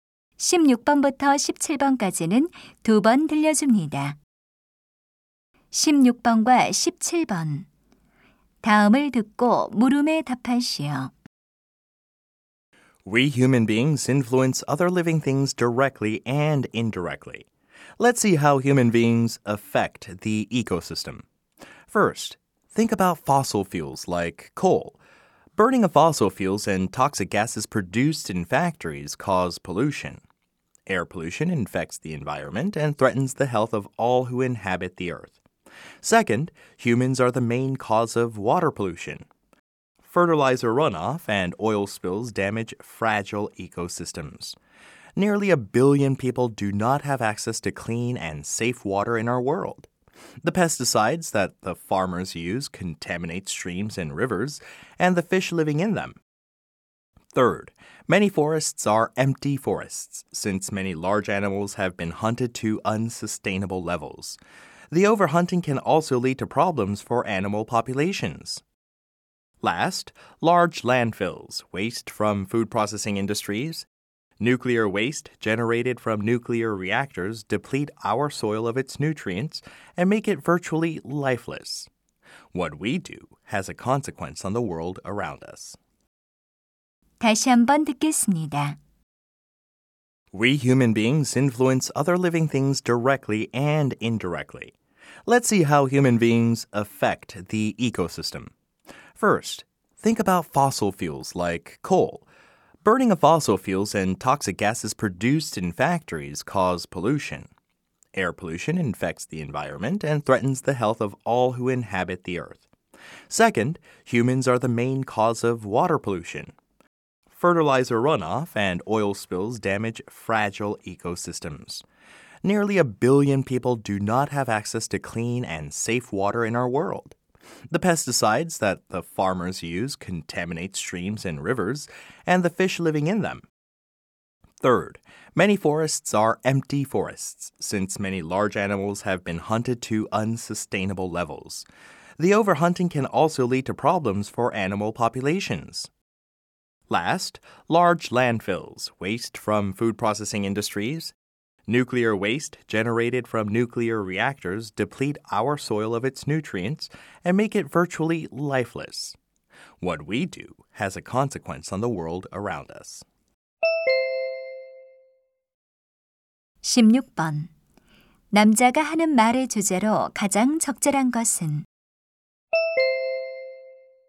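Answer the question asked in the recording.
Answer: 인간이 생태계에 미치는 영향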